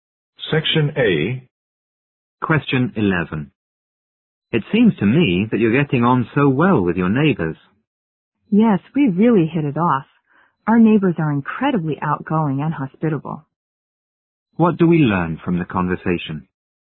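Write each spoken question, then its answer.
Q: What do we learn from the conversation?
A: They get along very well with their friendly neighbors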